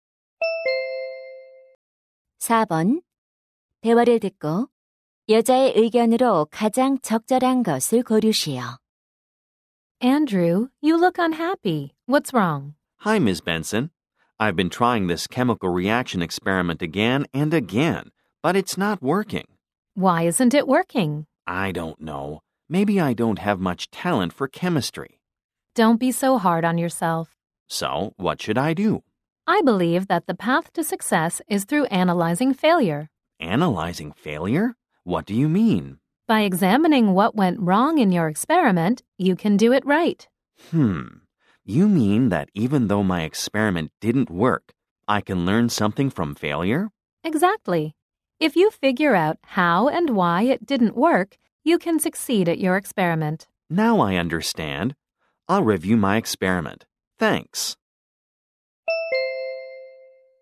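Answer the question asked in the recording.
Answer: 실패를 분석하는 것이 성공으로 가는 길이다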